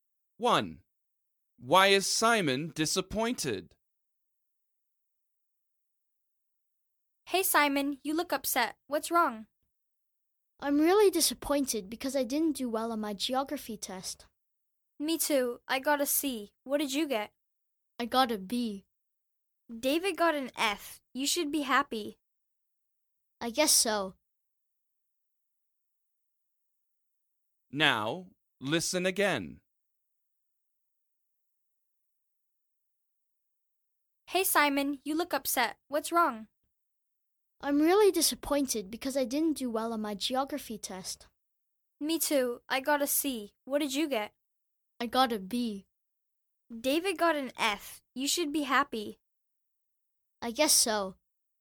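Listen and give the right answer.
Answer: He didn't do well on his geography test (he got a B)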